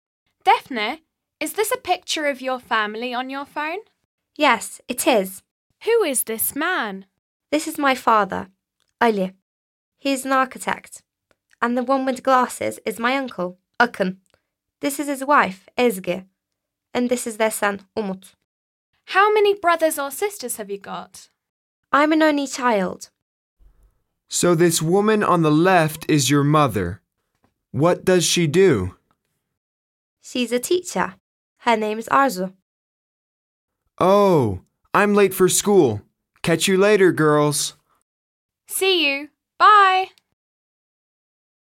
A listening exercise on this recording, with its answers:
B. Listen to Defne and her friends, and answer the questions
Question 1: What does Defne's father do?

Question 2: Who is Defne's aunt?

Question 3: Who is Umut?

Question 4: How many brothers and sisters has Defne got?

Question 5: What does Arzu do?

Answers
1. Architect
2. Ezgi
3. Ezgi's son / Defne's cousin
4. None
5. Teacher

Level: 9. sınıf